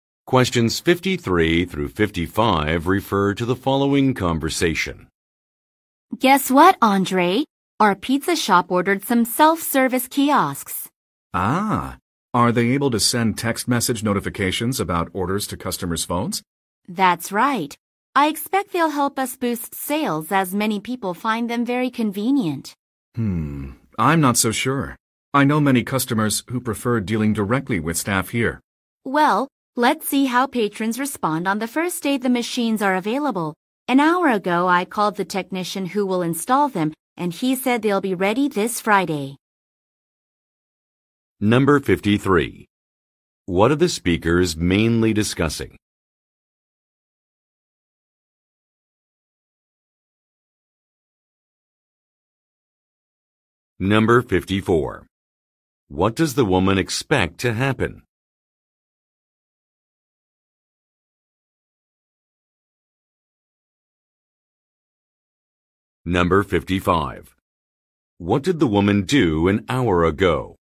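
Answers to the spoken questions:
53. Self-service kiosks ordered for the pizza shop
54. Sales will increase
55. She called a technician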